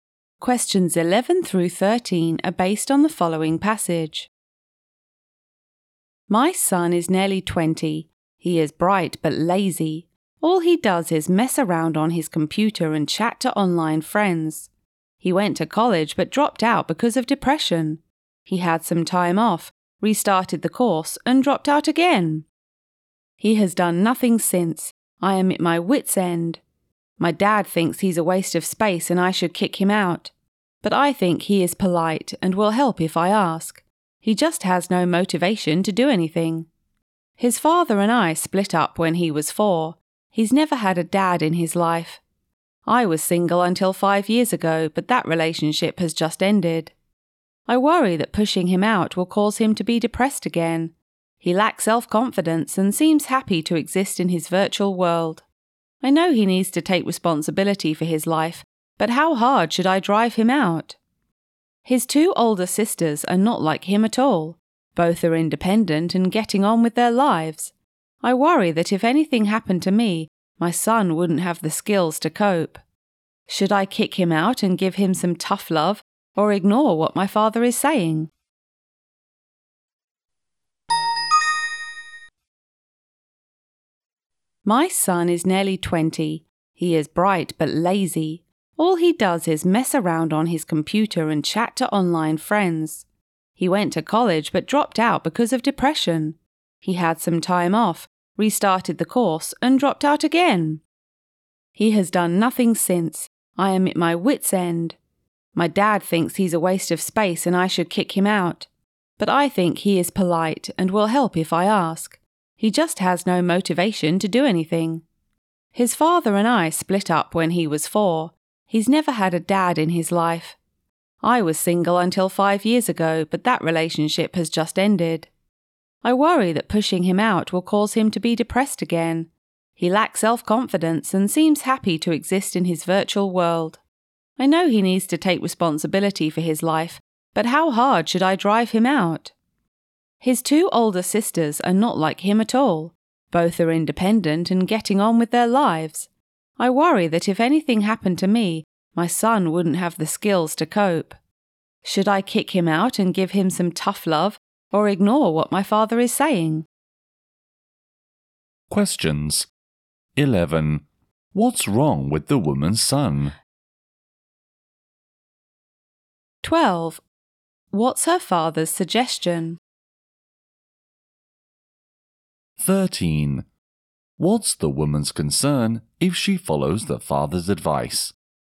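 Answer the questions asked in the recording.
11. He is lazy and has no motivation.
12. Kick the son out.
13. Her son may become depressed again.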